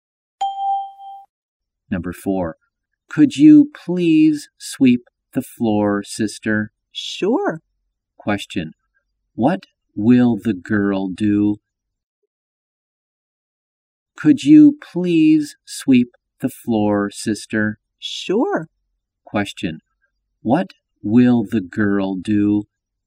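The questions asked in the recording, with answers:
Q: what will the girl do?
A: Sweep the floor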